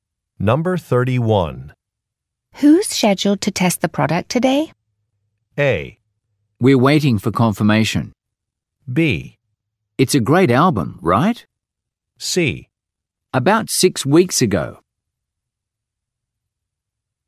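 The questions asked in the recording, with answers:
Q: Who's scheduled to test the product today?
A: A: We're waiting for confirmation.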